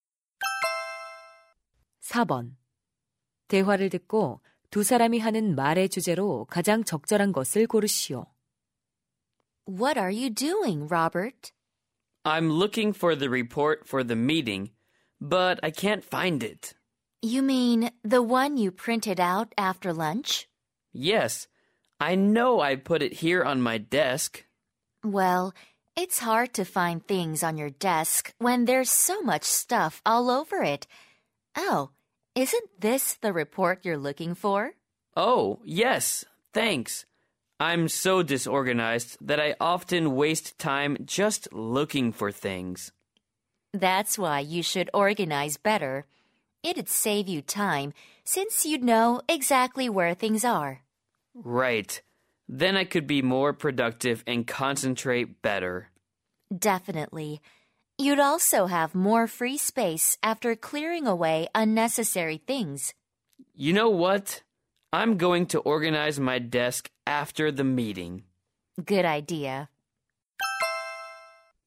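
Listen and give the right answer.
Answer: 책상 정리의 장점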